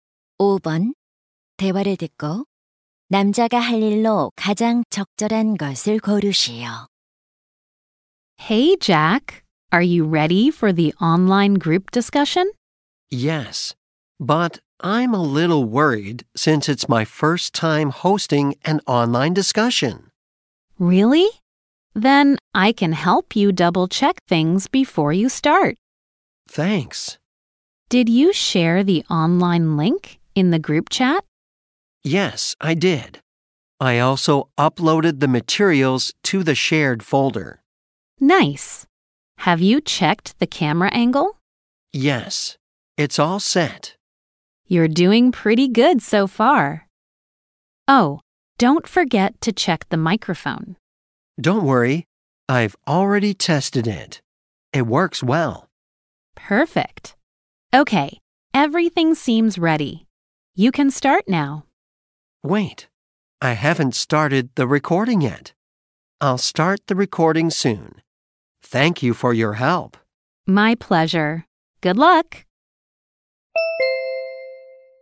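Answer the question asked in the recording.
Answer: 녹화 시작하기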